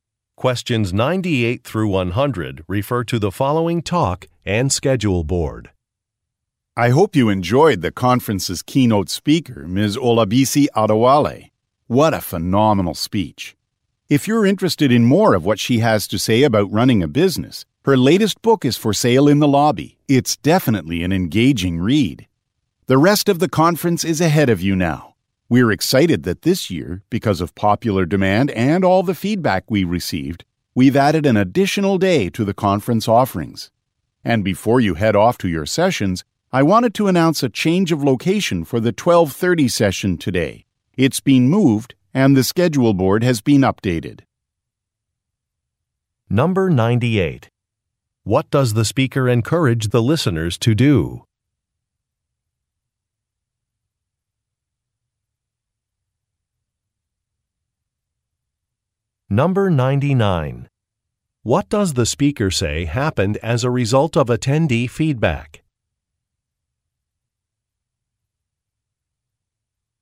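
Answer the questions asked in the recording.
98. Buy the keynote speaker's book
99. An extra day was added to the conference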